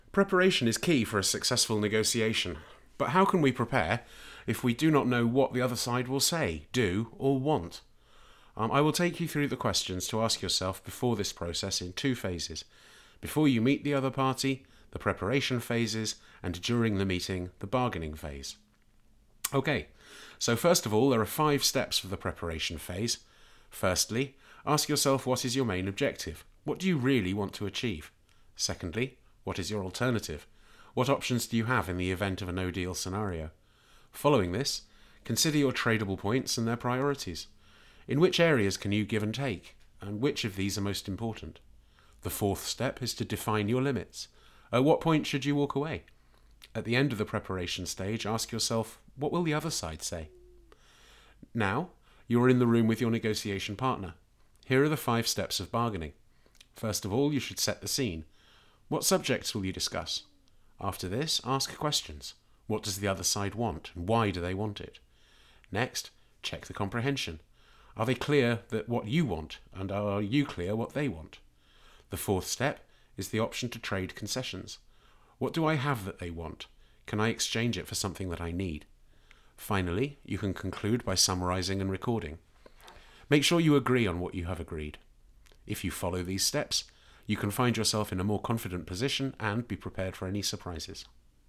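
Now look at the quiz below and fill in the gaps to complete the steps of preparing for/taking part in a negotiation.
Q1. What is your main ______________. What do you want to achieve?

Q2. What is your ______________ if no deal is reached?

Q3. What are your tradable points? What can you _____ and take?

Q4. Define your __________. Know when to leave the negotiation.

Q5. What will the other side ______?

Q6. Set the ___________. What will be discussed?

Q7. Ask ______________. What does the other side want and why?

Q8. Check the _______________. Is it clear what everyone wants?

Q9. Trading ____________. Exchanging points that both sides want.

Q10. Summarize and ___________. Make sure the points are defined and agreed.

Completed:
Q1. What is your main objective. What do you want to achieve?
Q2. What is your alternative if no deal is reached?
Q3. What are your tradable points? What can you give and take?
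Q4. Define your limits. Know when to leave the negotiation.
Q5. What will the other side say?
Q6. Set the scene. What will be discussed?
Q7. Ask questions. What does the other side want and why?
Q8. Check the comprehension. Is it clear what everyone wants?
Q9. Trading concessions. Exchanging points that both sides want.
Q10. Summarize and record. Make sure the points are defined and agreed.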